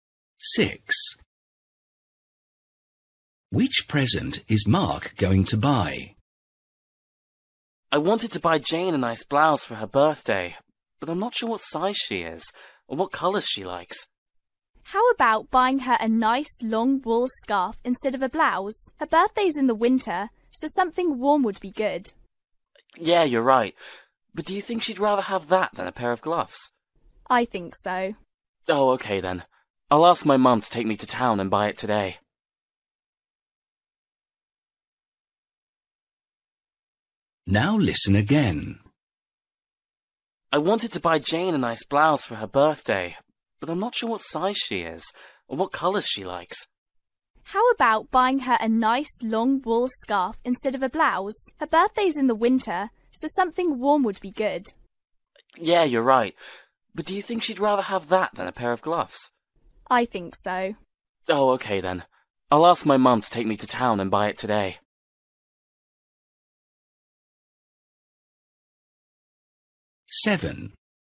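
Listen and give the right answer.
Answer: A long wool scarf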